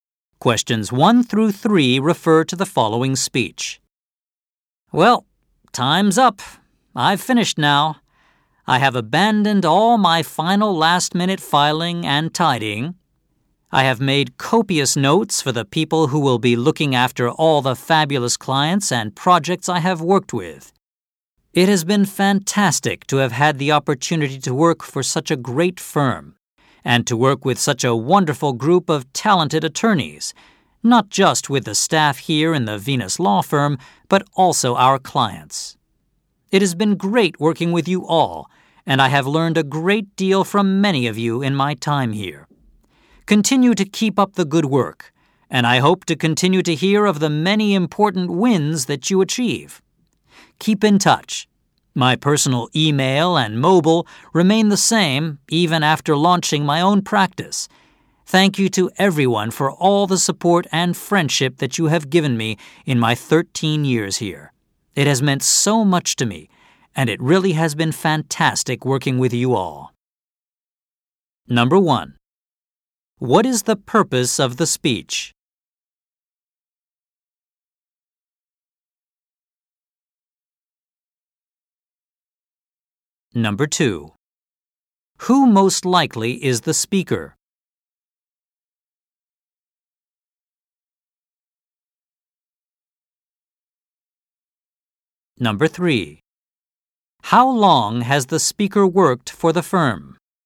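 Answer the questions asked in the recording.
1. To say goodbye to colleagues before leaving the firm
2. An attorney (lawyer)
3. 13 years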